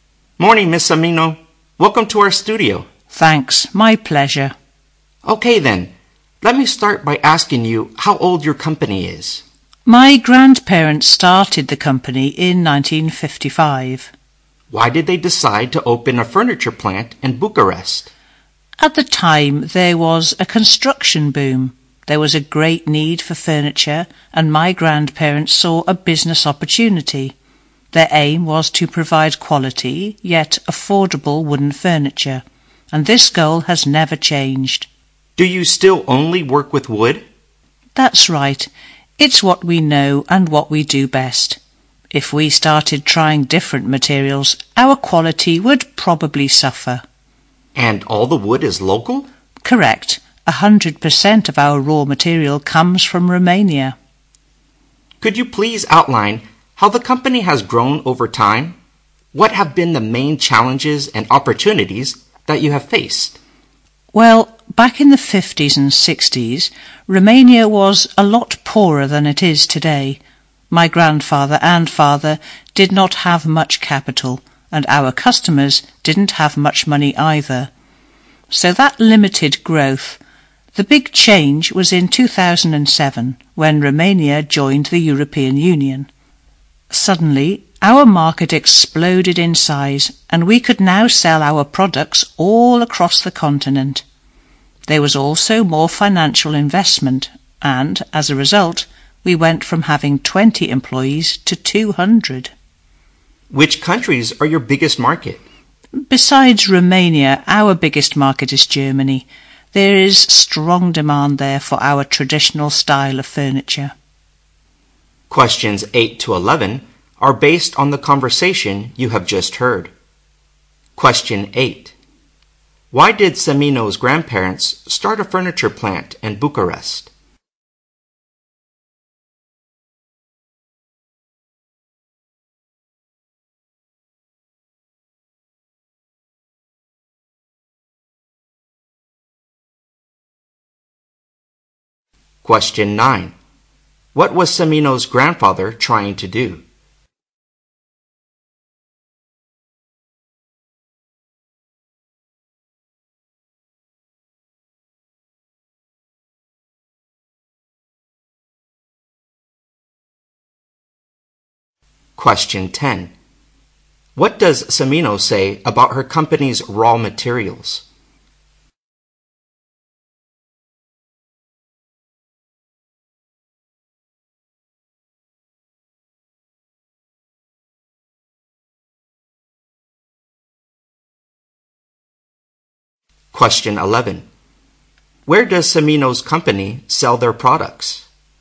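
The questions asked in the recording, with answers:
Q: Why did Semino's grandparents start a furniture plant in Bucharest?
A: There was a construction boom and a great need for furniture.

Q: What was Cimino's grandfather trying to do?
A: Provide quality yet affordable wooden furniture.

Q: What does Cimino say about her company's raw materials?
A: All of the wood comes from Romania.

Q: Where does Cimino's company sell their products?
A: Across Europe, mainly Romania and Germany.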